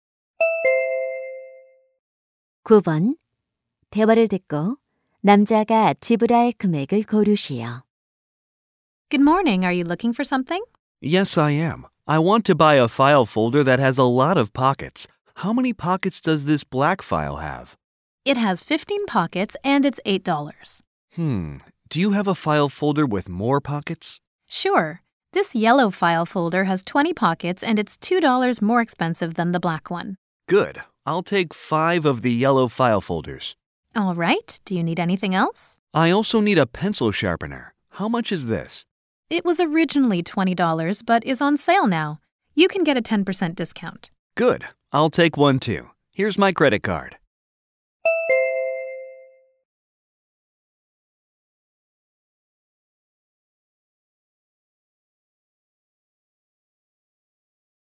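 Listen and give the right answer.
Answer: $68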